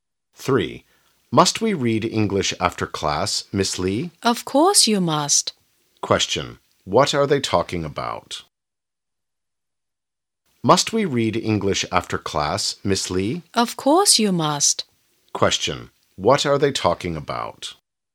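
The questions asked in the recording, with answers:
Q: What are they talking about?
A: Reading English after class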